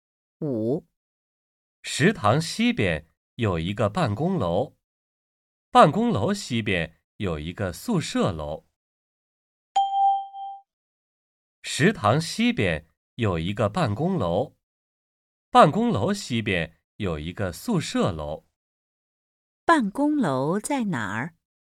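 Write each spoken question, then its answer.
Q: 办公楼在哪儿?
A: 在食堂西边,宿舍楼东边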